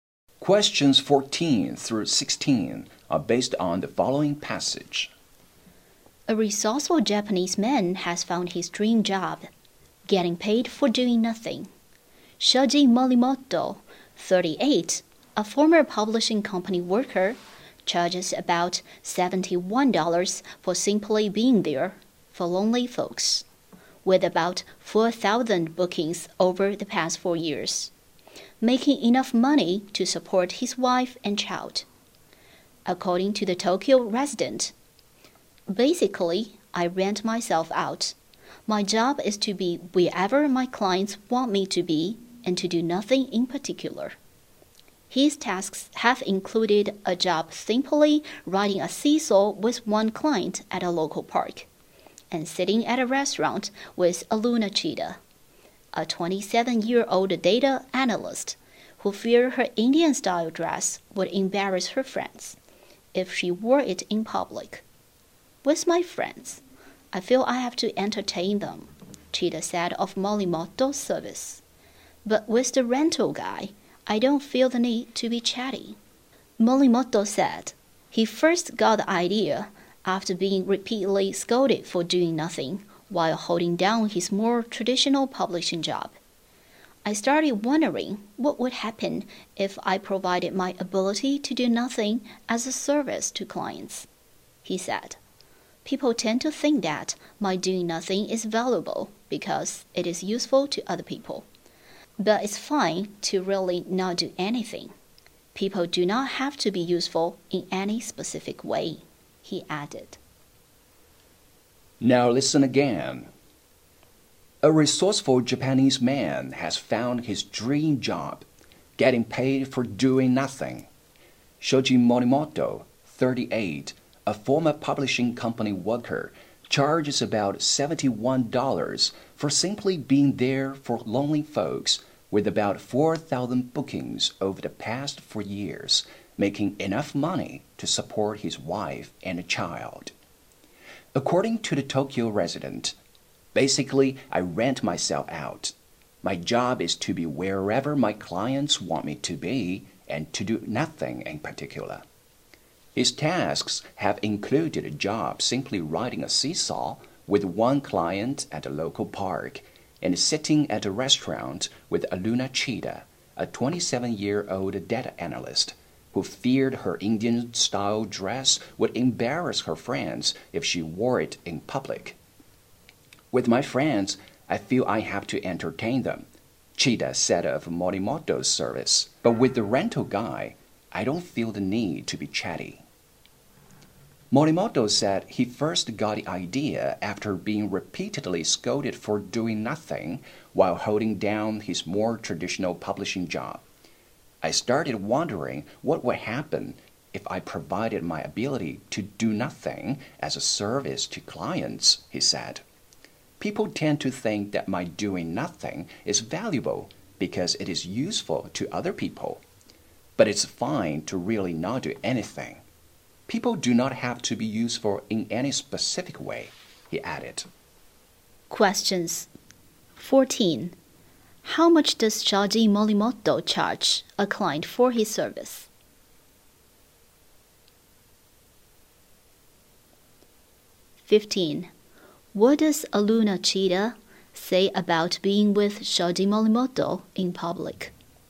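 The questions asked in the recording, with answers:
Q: How much does Shoji Morimoto charge a client for his service?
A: About $71.

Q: What does Aluna Chida say about being with Shoji Morimoto in public?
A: She doesn't feel the need to be chatty or entertain him.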